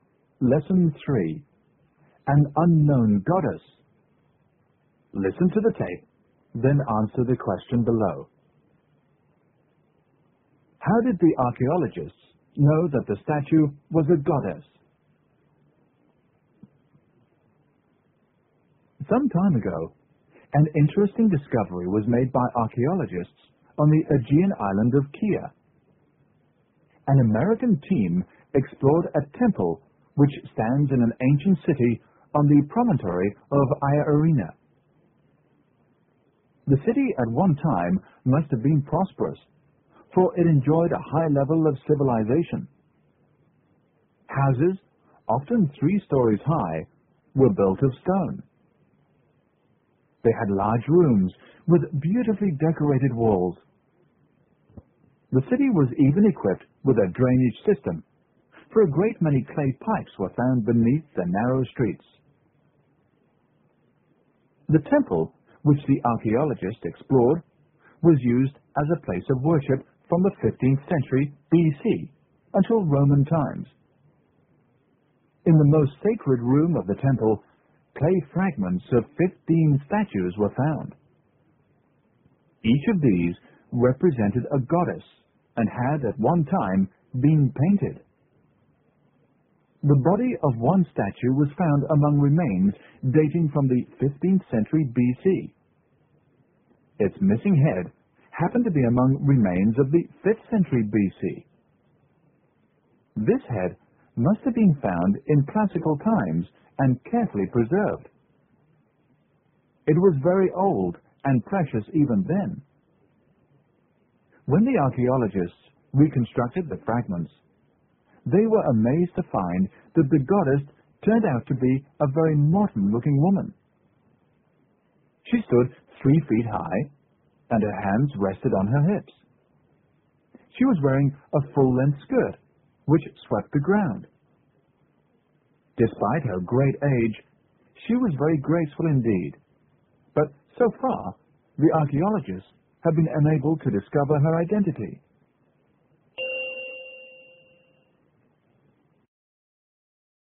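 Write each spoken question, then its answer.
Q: How did the archaeologists know that the statue was a goddess?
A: All the statues found in the temple's most sacred room represented goddesses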